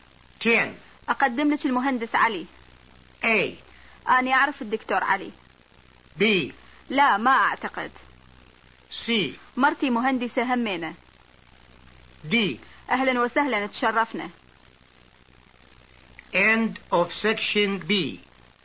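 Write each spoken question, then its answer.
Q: أقدم لك المهندس علي.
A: D: أهلا وسهلا تشرفنا.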